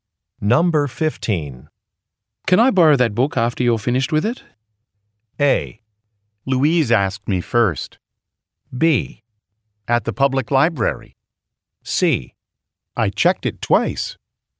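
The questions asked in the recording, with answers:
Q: Can I borrow that book after you're finished with it?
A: A: Louise asked me first.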